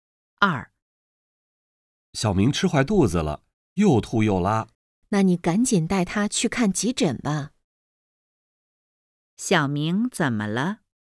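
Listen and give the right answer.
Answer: 吃坏肚子了,又吐又拉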